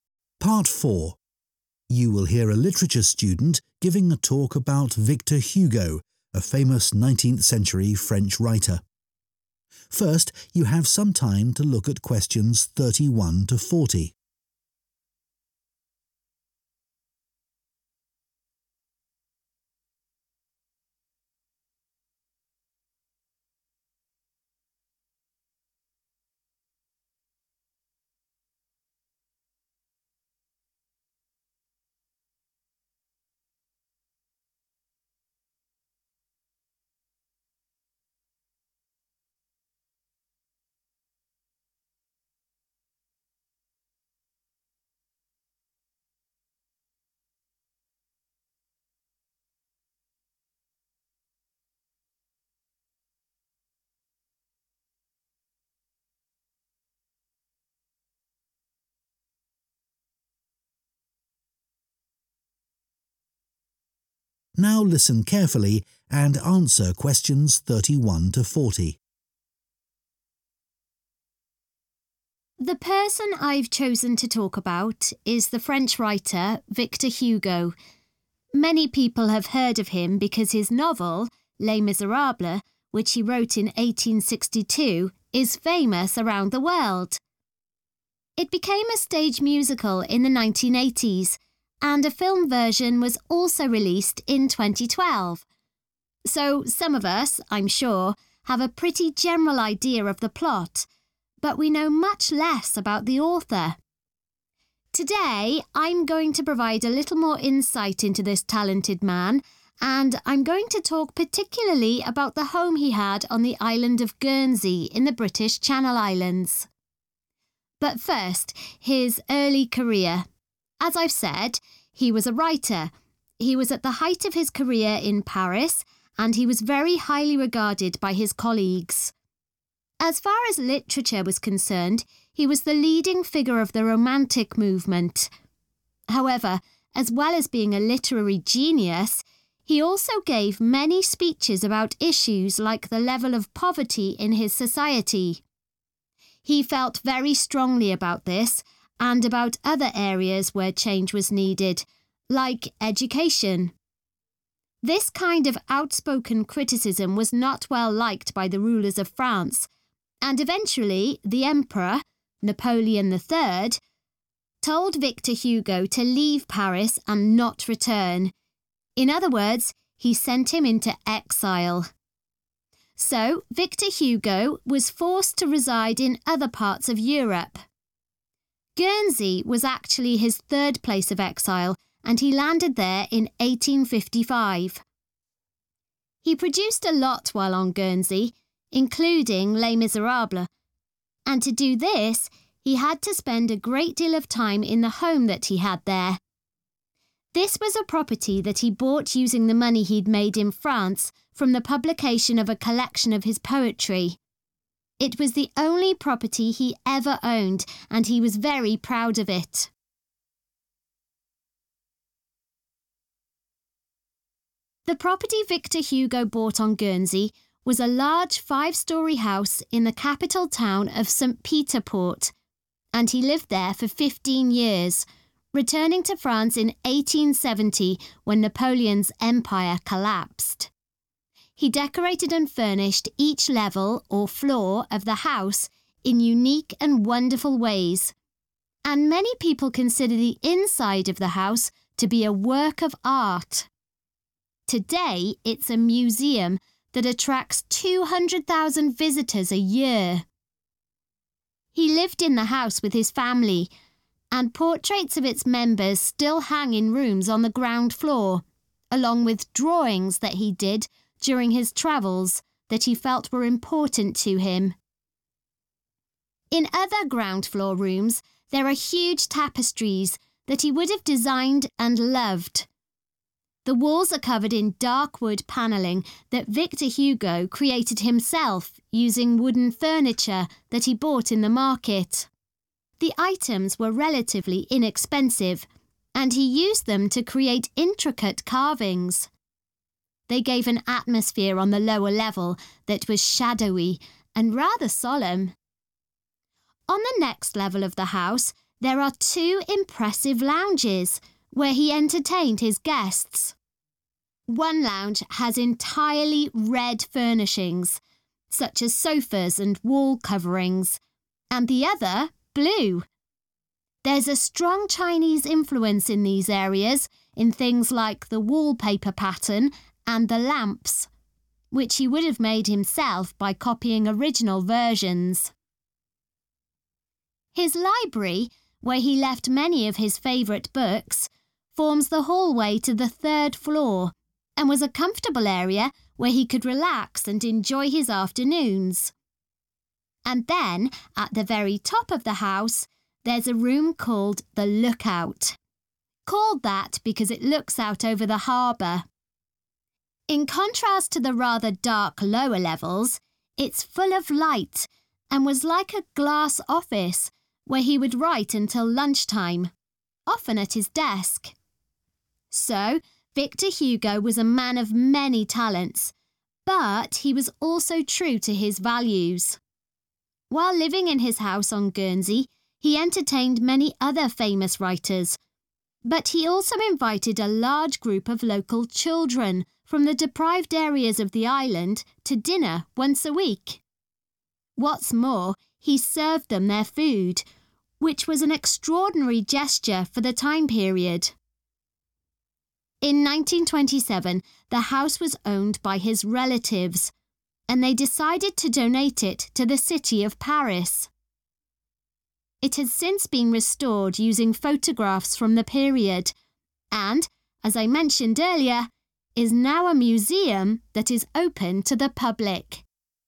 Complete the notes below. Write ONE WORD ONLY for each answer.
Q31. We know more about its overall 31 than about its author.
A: plot

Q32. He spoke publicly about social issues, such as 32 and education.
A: poverty

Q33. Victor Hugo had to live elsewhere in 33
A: Europe

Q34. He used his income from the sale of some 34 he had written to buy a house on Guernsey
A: poetry

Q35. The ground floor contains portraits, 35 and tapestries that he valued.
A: drawings

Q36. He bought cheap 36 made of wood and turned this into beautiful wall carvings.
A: furniture

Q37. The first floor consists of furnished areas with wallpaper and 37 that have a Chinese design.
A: lamps

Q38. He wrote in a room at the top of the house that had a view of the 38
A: harbour / harbor

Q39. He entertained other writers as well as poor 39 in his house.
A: children

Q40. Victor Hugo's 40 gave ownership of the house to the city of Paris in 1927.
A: relatives